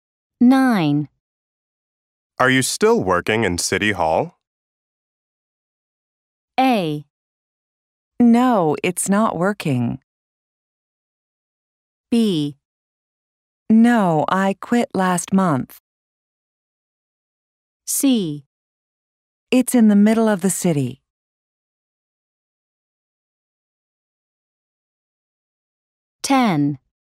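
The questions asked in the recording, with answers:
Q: Are you still working in City Hall?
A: B: No, I quit last month.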